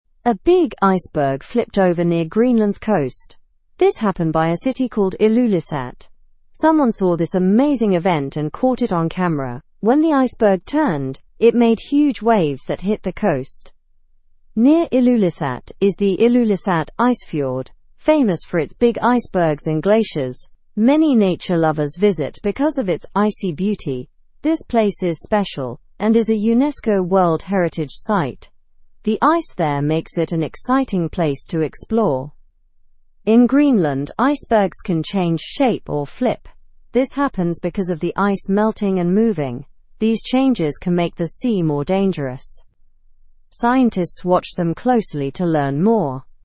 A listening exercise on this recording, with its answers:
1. Where did the iceberg flip occur?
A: Near the coast of Greenland.

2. What did the turning iceberg cause?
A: It created large waves.

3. Why is Ilulissat a popular travel spot?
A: Because of its natural ice beauty.

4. What kind of site is the Ilulissat Icefjord?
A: It is a UNESCO World Heritage site.

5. What causes icebergs in Greenland to flip?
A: Melting and shifting ice cause them to flip.

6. Who observes the changes in icebergs?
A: Scientists observe them.

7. What effect can changing icebergs have on the sea?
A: They can affect sea conditions, making it more dangerous.

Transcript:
A big iceberg flipped over near Greenland's coast. This happened by a city called Ilulissat. Someone saw this amazing event and caught it on camera. When the iceberg turned, it made huge waves that hit the coast.
Near Ilulissat is the Ilulissat Icefjord, famous for its big icebergs and glaciers. Many nature lovers visit because of its icy beauty. This place is special and is a UNESCO World Heritage site. The ice there makes it an exciting place to explore.
In Greenland, icebergs can change shape or flip. This happens because of the ice melting and moving. These changes can make the sea more dangerous. Scientists watch them closely to learn more.

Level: Level 2